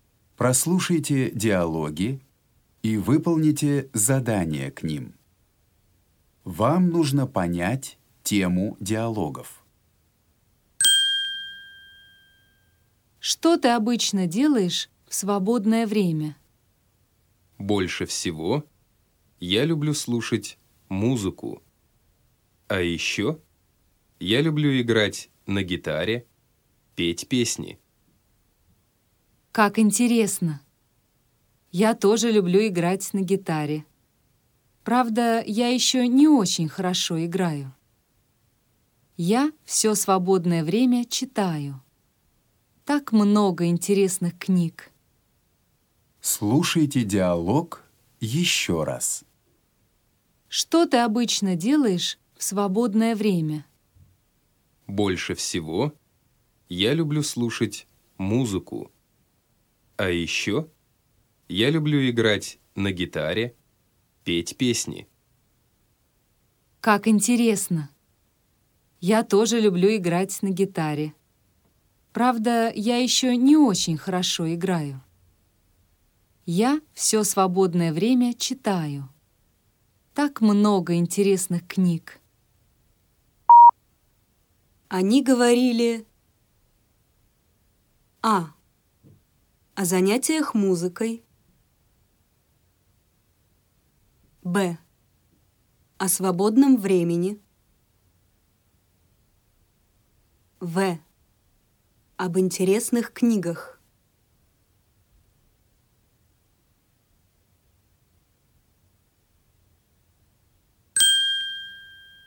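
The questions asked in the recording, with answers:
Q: Они говорили о занятиях музыкой, б.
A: Б: о свободном времени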